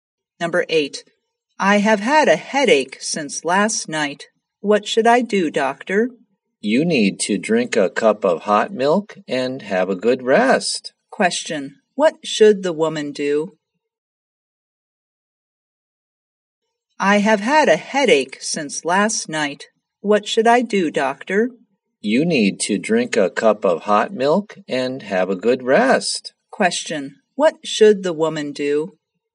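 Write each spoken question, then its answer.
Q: What should the woman do?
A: Drink a cup of hot milk and have a good rest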